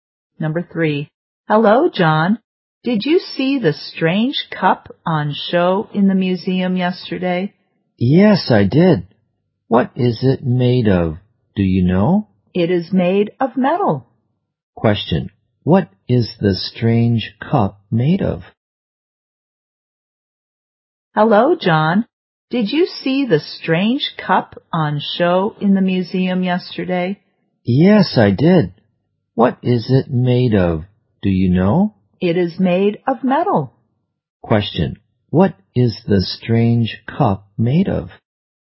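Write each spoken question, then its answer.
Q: what is the strange cup made of?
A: Metal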